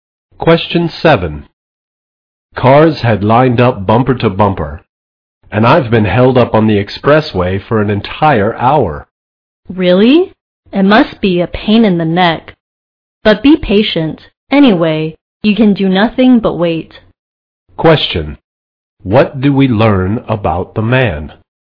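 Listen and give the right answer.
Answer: He was stuck in a traffic jam for an hour.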